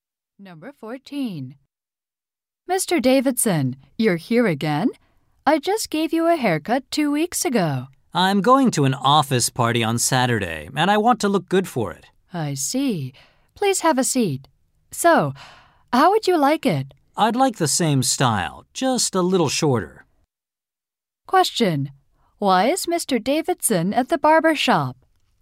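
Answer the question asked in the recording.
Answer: He wants to look good for an office party on Saturday.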